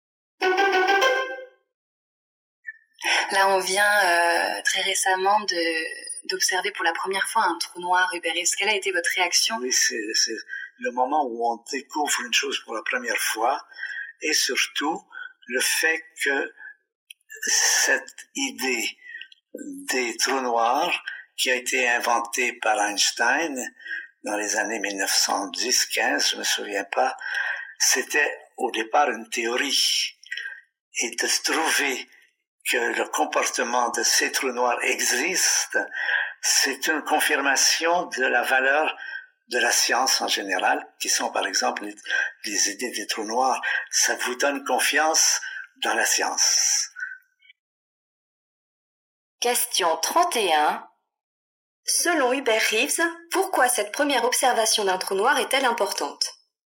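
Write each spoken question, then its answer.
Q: Selon Hubert Reeves, pourquoi cette première observation d'un trou noir est-elle importante ?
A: Elle confirme la valeur de la science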